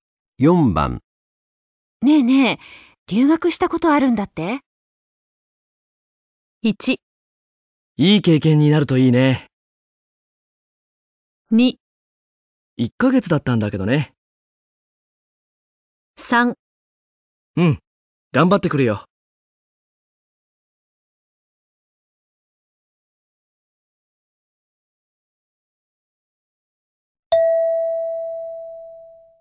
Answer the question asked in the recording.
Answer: 2

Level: N2 Listening · Test 3